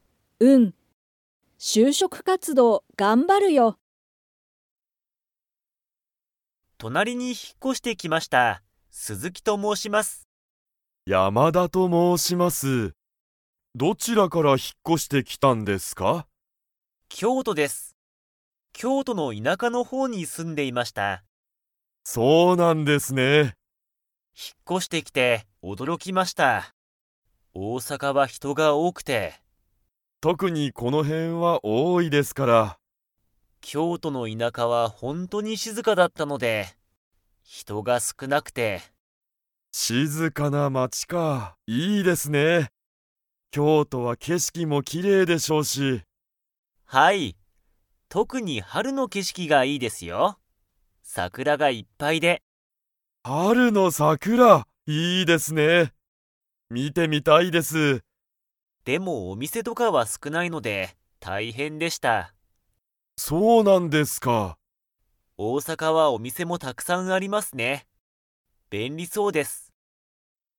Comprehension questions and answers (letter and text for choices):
Comprehension Quiz (Skip if you don't understand the conversation yet)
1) 鈴木すずきさんはどこから引ひっ越こしてきましたか?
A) 東京とうきょう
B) 大阪おおさか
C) 京都きょうと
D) 海外かいがい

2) 大阪おおさかは人ひとが 。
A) 多おおい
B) 少すくない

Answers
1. C) 京都きょうと
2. A) 多おおい

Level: Level 4